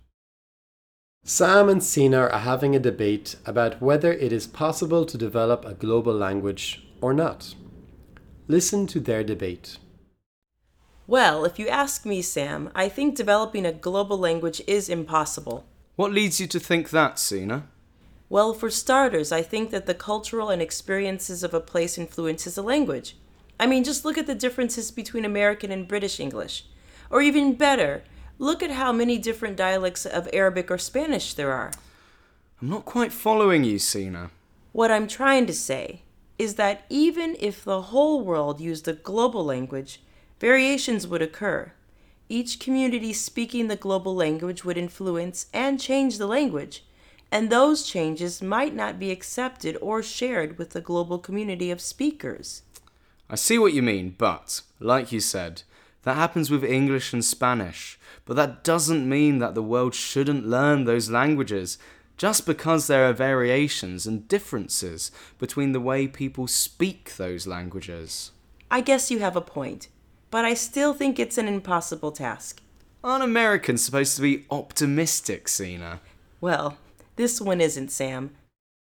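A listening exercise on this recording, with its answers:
Sina and Sam are debating whether a global language could ever happen.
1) Why does Sina think that a global language isn't possible?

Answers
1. Each community would change the language, so variations would occur.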